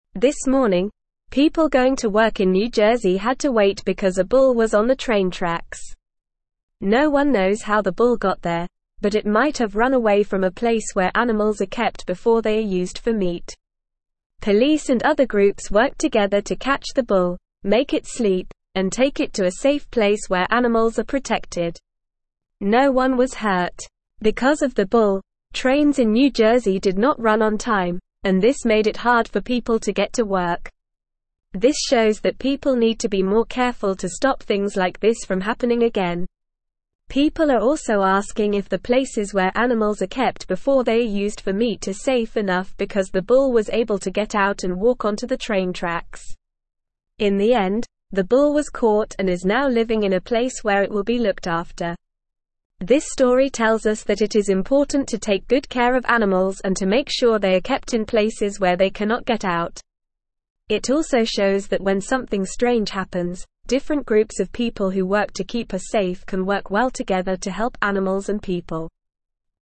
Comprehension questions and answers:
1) This morning, people going to work in New Jersey had to (1)______ because a bull was on the train (2)______.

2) This morning, people going to work in New Jersey had to (1)______ because a bull was on the train (2)______.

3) Police and other (3)______ worked together to catch the bull, make it sleep, and take it to a safe place where animals are (4)______.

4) Police and other (3)______ worked together to catch the bull, make it sleep, and take it to a safe place where animals are (4)______.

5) Because of the bull, trains in New (5)______ did not run on time, and this made it hard for people to get to work.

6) This shows that people need to be more careful to stop (6)______ like this from happening again.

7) People are also (7)______ if the places where animals are kept before they are used for meat are safe enough because the bull was able to get out and (8)______ onto the train tracks.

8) People are also (7)______ if the places where animals are kept before they are used for meat are safe enough because the bull was able to get out and (8)______ onto the train tracks.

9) In the end, the bull was (9)______ and is now living in a place where it will be looked after.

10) It also shows that when something (10)______ happens, different groups of people who (11)______ to keep us (12)______ can work well together to help animals and people.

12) It also shows that when something (10)______ happens, different groups of people who (11)______ to keep us (12)______ can work well together to help animals and people.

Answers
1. wait
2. tracks
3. groups
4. protected
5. Jersey
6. things
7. asking
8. walk
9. caught
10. strange
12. safe

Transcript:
This morning, people going to work in New Jersey had to wait because a bull was on the train tracks. No one knows how the bull got there, but it might have run away from a place where animals are kept before they are used for meat. Police and other groups worked together to catch the bull, make it sleep, and take it to a safe place where animals are protected. No one was hurt.
Because of the bull, trains in New Jersey did not run on time, and this made it hard for people to get to work. This shows that people need to be more careful to stop things like this from happening again. People are also asking if the places where animals are kept before they are used for meat are safe enough because the bull was able to get out and walk onto the train tracks.
In the end, the bull was caught and is now living in a place where it will be looked after. This story tells us that it is important to take good care of animals and to make sure they are kept in places where they cannot get out. It also shows that when something strange happens, different groups of people who work to keep us safe can work well together to help animals and people.

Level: Level 2